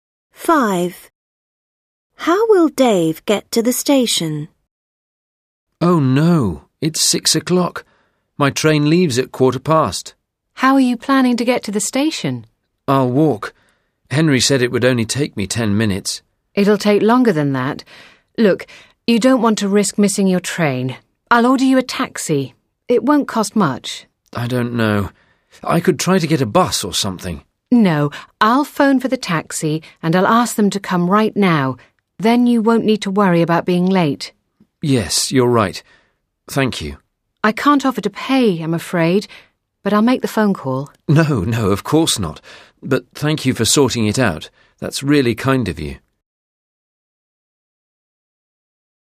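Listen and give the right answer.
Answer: by taxi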